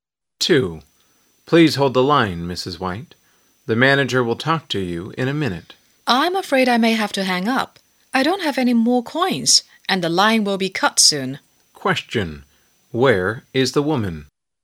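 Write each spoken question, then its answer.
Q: Where is the woman?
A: In a public phone booth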